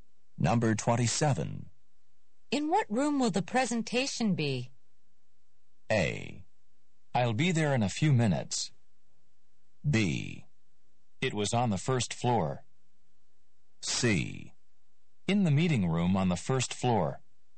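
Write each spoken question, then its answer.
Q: In what room will the presentation be?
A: C: In the meeting room on the first floor.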